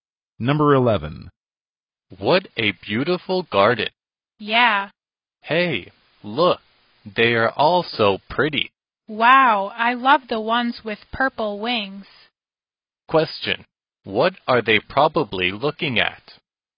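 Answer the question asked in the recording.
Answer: Butterflies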